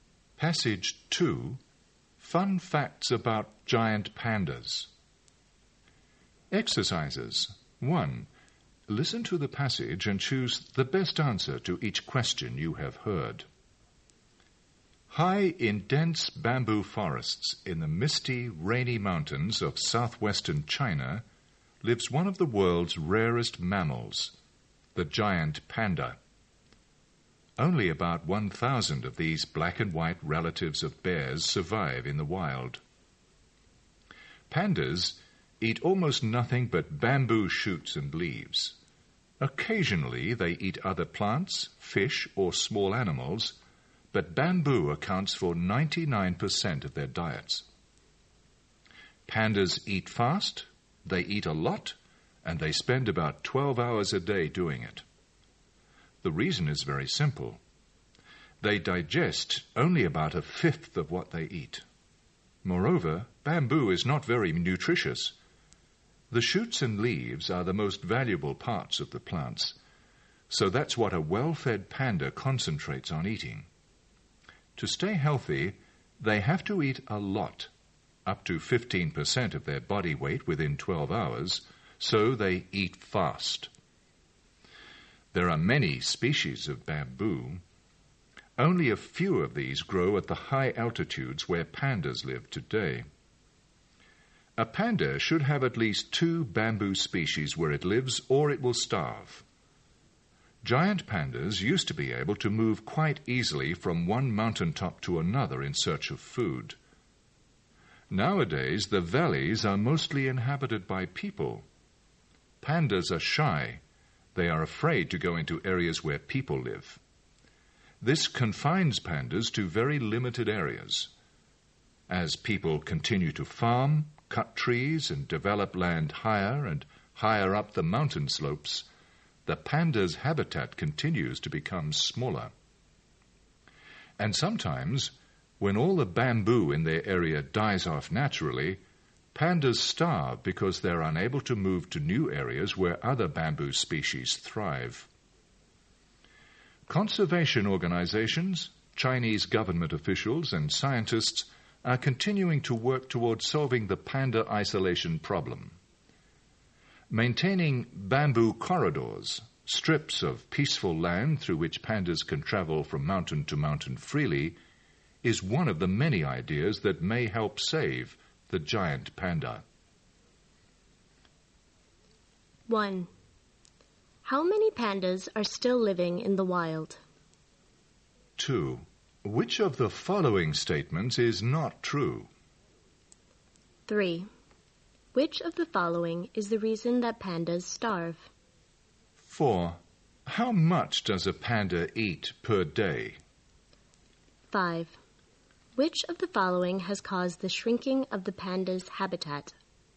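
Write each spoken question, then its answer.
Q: How many pandas are still living in the wild?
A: About 1,000

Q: Which of the following has caused the shrinking of the panda's habitat?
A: People farming, cutting trees and developing land higher up the mountains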